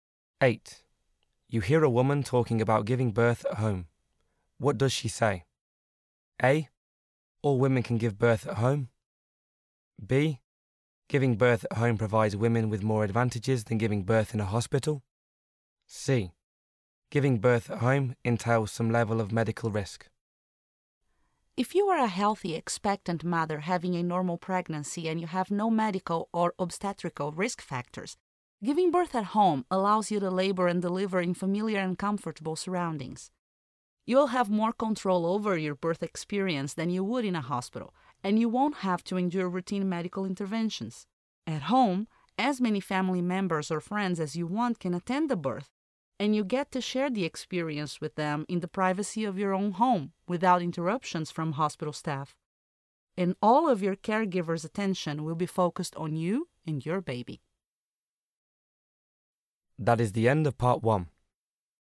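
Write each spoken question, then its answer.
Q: What does she say?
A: B: Giving birth at home provides women with more advantages than giving birth in a hospital.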